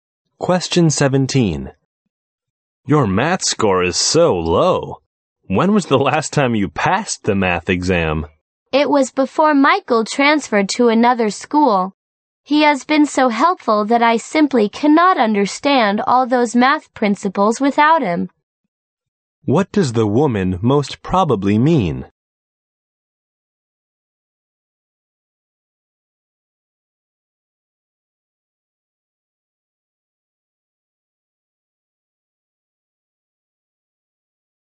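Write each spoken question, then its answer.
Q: What does the woman most probably mean?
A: She hasn't passed math since Michael, who helped her, left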